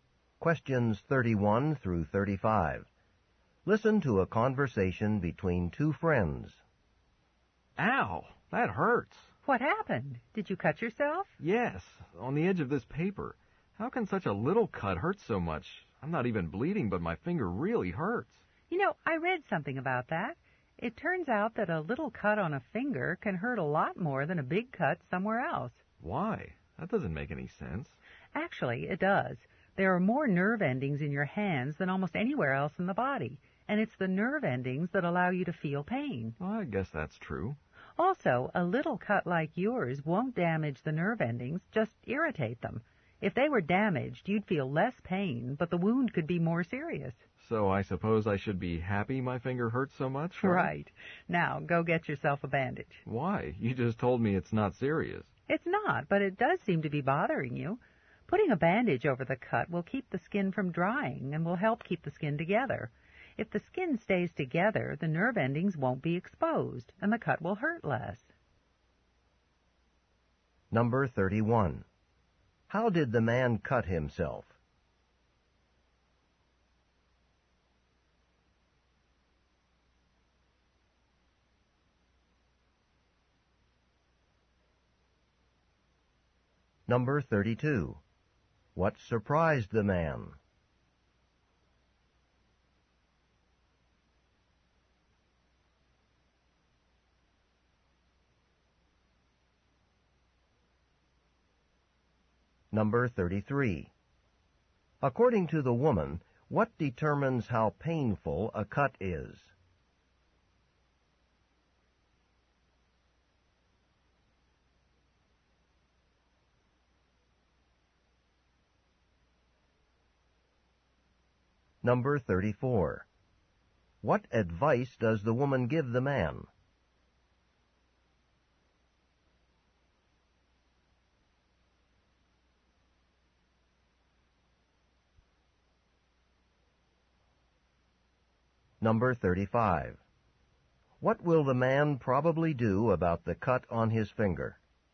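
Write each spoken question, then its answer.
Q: How did the man cut himself?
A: On the edge of a piece of paper.

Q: What surprised the man?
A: A little cut hurt so much.

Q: According to the woman, what determines how painful a cut is?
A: How many nerve endings are in that area.

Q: What advice does the woman give the man?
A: Put a bandage on the cut.

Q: What will the man probably do about the cut on his finger?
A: Put a bandage on it.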